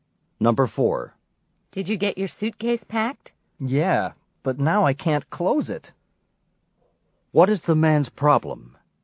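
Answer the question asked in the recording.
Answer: He can't close his suitcase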